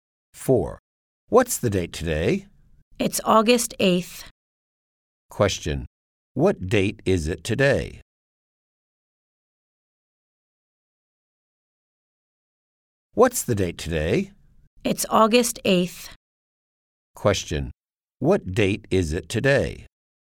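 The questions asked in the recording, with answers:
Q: What date is it today?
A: August 8th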